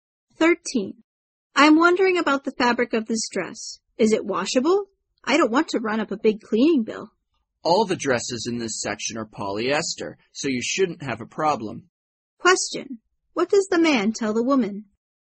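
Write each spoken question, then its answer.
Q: What does the man tell the woman?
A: The dress is polyester and washable, so no cleaning bill.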